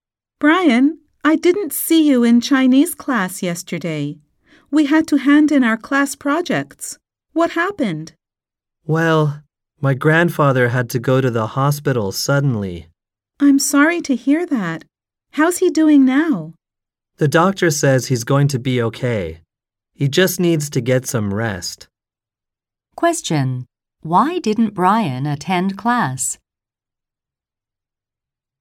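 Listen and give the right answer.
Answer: His grandfather suddenly had to go to the hospital.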